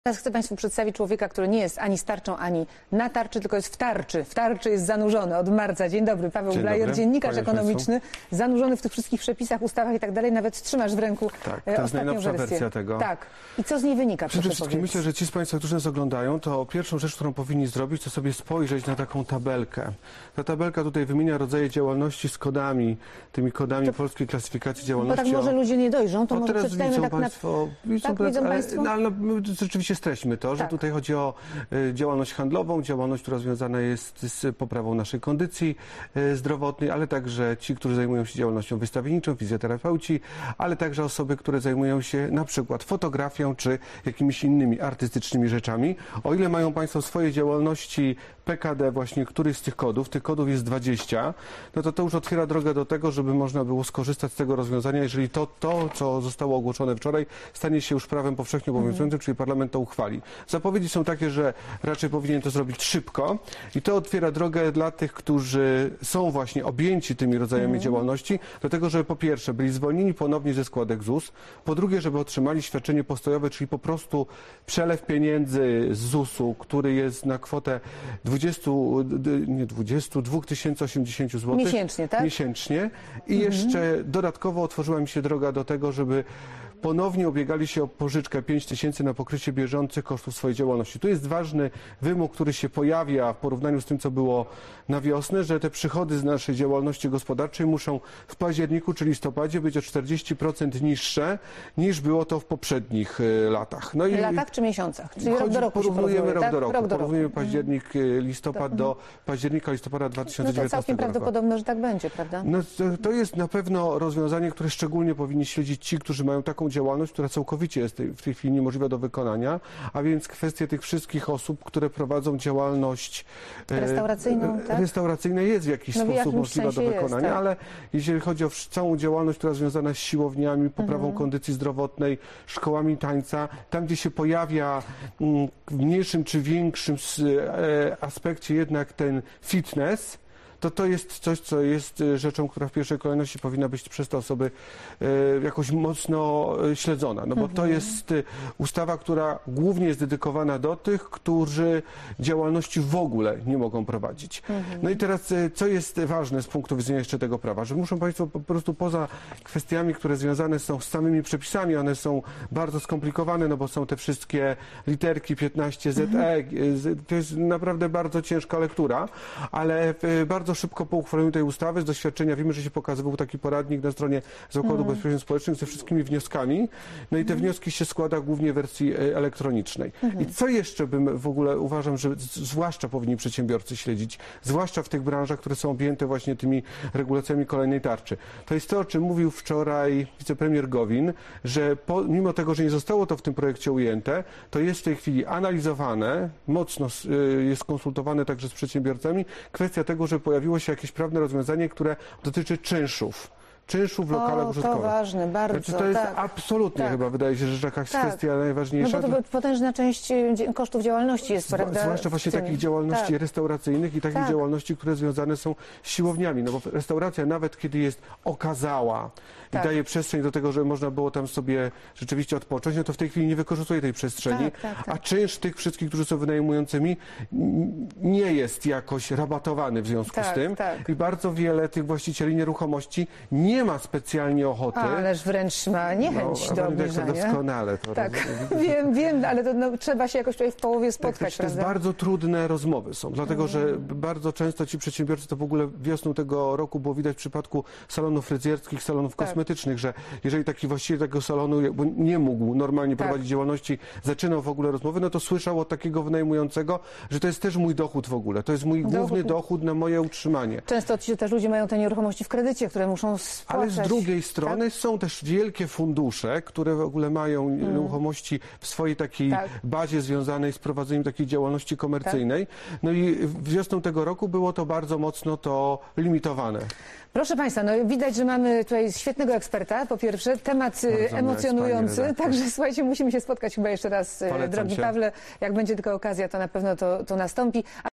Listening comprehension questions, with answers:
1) Co jest w tabelce, którą pokazuje Paweł Blajer?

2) Jakie rodzaje działalności są w niej uwzględnione?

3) Ile jest kodów PKD?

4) Jakie są ulgi dla działalności, wymienionych w tabelce?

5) Ile wynosi świadczenie postojowe?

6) Jaki jest ważny wymóg do otrzymania pomocy?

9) O czym mówił wicepremier Gowin?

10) Dlaczego rozmowy o czynszu między firmą i wynajmującym bywają trudne?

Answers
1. Tabelka wymienia rodzaje działalności z kodami polskiej klasyfikacji działalności.
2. Działalność handlowa, działalność związana jest z poprawą kondycji zdrowotnej, działalność wystawiennicza, fizjoterapeuci, ale także osoby zajmujące się np. fotografią czy jakimiś innymi artystycznymi rzeczami.
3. 20
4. To otwiera drogę dla tych, którzy są objęci tymi rodzajami działalności, żeby po pierwsze byli zwolnieni ponownie ze składek ZUS, po drugie, żeby otrzymali świadczenie postojowe, czyli po prostu przelew pieniędzy z ZUSu i dodatkowo otworzyła im się droga do tego, żeby ponownie ubiegali się o pożyczkę 5000 na pokrycie bieżących kosztów swojej działalności.
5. 2080zł/miesiąc
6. Przychody z działalności gospodarczej muszą być w październiku lub listopadzie o 40% niższe, niż było to w poprzednich latach, porównujemy rok do roku.
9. Mimo tego, że nie zostało to w tym projekcie ujęte, to jest w tej chwili analizowane, mocno konsultowane z przedsiębiorcami: kwestia tego, że pojawiło się jakieś prawne rozwiązanie, które dotyczy czynszów lokali użytkowych.
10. Czynsz nie jest rabatowany w związku z tym, że lokal nie jest używany. To było widać wiosną tego roku, w wypadku salonów fryzjerskich, salonów kosmetycznych, że jeżeli taki właściciel tego salonu nie mógł normalnie prowadzić działalności, zaczynał w ogóle rozmowę, to słyszał od takiego wynajmującego, że to jest też mój dochód, mój główny dochód na moje utrzymanie.